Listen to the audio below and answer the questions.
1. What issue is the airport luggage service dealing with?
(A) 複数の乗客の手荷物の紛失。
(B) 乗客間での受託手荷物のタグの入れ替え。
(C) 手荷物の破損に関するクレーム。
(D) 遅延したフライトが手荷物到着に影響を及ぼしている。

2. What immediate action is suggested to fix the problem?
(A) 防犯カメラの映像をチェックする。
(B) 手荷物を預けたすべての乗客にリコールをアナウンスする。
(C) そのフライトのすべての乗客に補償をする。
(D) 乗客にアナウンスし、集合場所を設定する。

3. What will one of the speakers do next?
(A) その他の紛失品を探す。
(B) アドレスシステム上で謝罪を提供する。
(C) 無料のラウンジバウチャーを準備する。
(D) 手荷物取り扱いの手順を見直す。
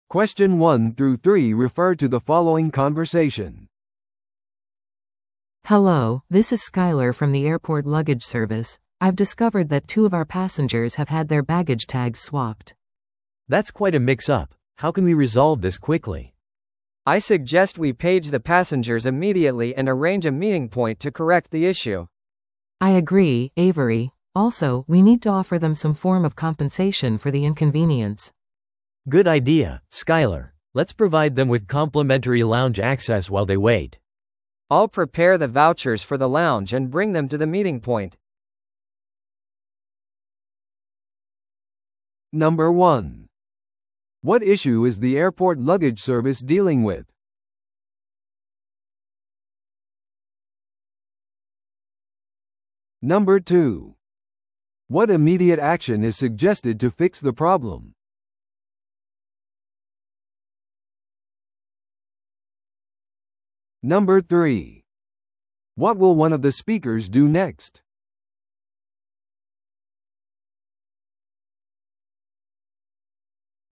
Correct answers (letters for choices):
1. B
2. D
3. C

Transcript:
A: Hello, this is Skyler from the airport luggage service. I've discovered that two of our passengers have had their baggage tags swapped.
B: That's quite a mix-up. How can we resolve this quickly?
C: I suggest we page the passengers immediately and arrange a meeting point to correct the issue.
A: I agree, Avery. Also, we need to offer them some form of compensation for the inconvenience.
B: Good idea, Skyler. Let's provide them with complimentary lounge access while they wait.
C: I'll prepare the vouchers for the lounge and bring them to the meeting point.